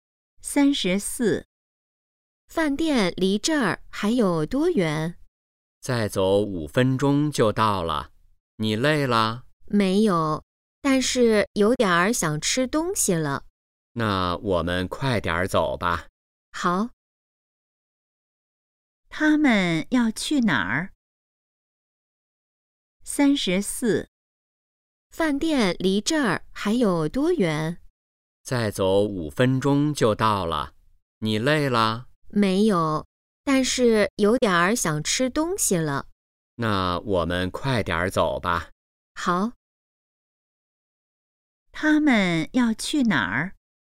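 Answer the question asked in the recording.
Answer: 饭店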